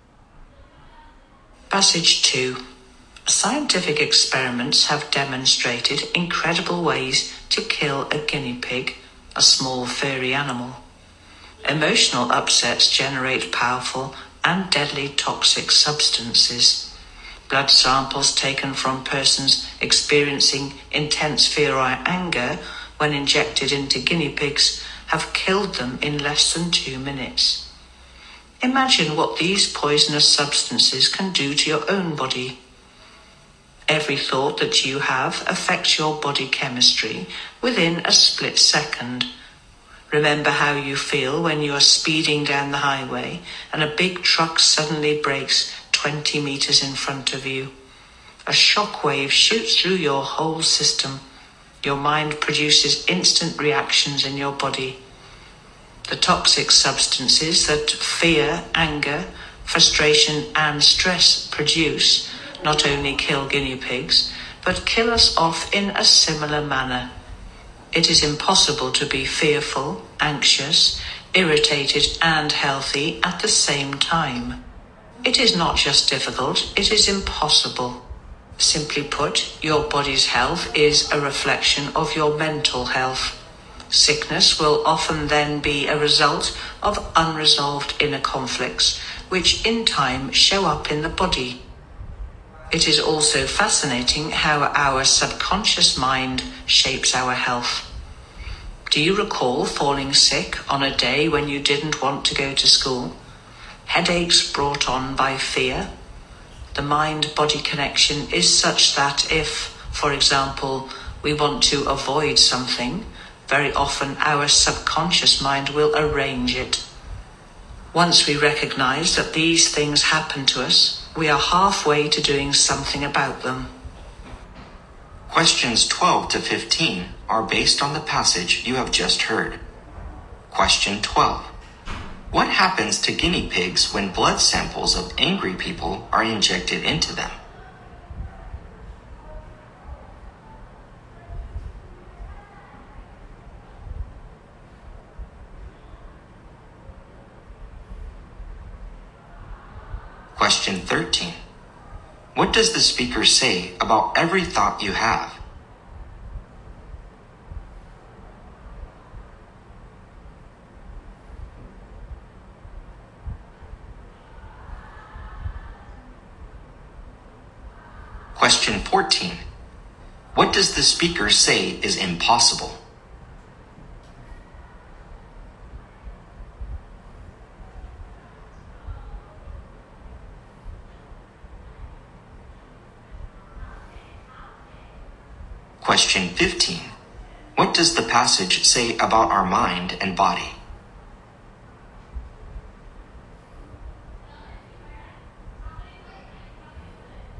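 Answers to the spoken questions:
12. They die in less than 2 minutes.
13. It affects your body chemistry within a split second.
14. To be fearful, anxious, irritated and healthy at the same time.
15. Your body's health reflects your mental health.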